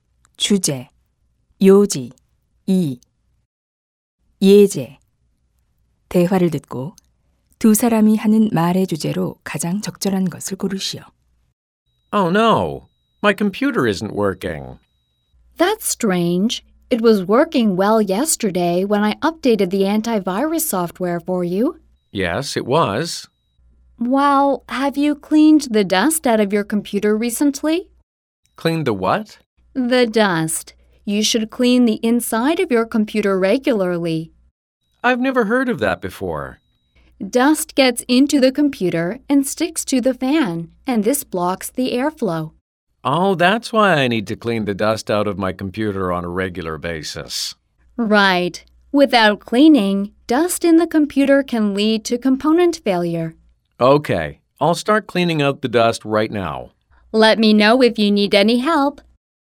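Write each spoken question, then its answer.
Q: 대화를 듣고 두 사람이 하는 말의 주제로 가장 적절한 것을 고르시오.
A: 컴퓨터 내부 먼지를 정기적으로 청소해야 하는 필요성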